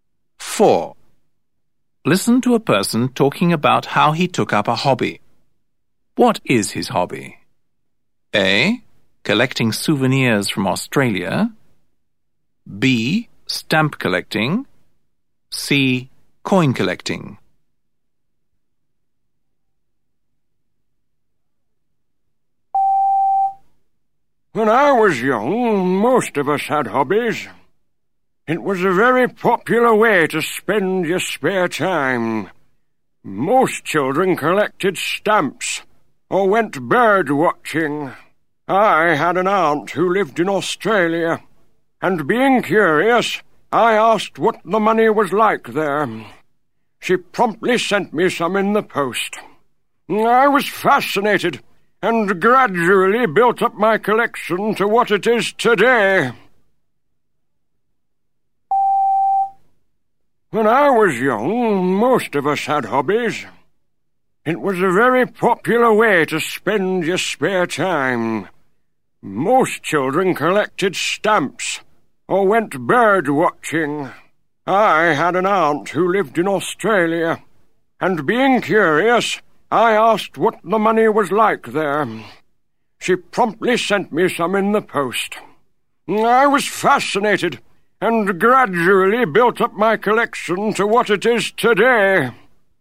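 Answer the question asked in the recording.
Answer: C: Coin collecting.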